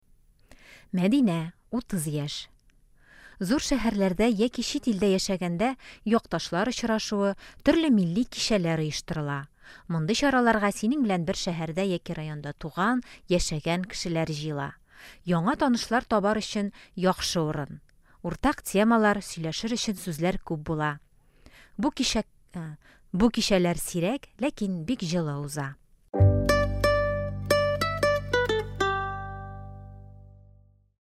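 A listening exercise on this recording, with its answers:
Бирем. Ответьте на вопросы по тексту.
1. Якташлар очрашуына кемнәр килә?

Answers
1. Синең белән бер шәһәрдә яки районда туган, яшәгән кешеләр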